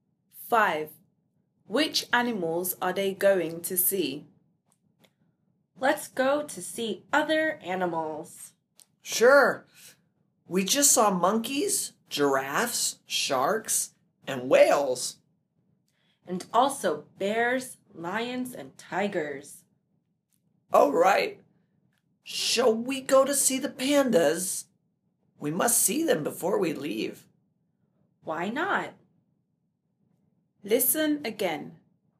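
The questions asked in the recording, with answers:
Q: Which animals are they going to see?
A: Pandas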